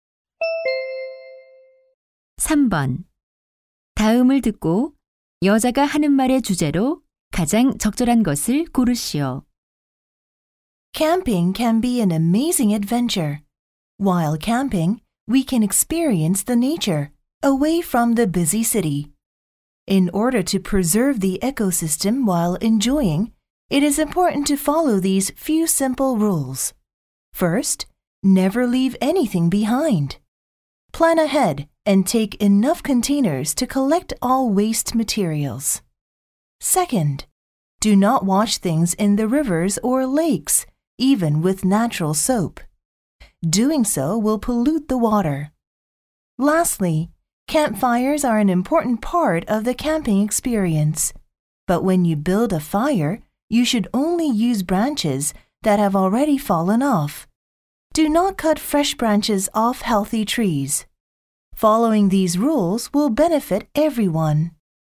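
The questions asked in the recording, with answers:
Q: 다음을 듣고 여자가 하는 말의 주제로 가장 적절한 것을 고르시오.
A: 캠핑 시 생태계를 보호하기 위한 규칙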